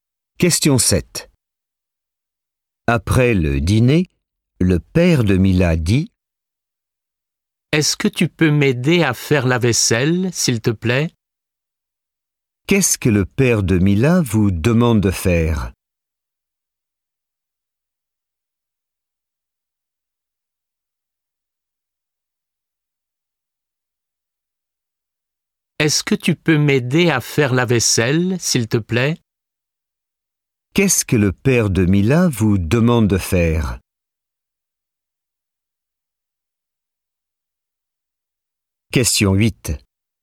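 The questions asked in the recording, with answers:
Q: Qu'est-ce que le père de Mila vous demande de faire?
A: La vaisselle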